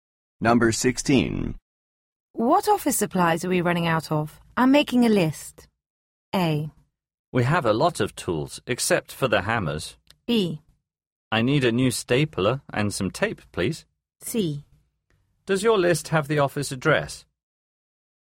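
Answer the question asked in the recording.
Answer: B: I need a new stapler and some tape, please.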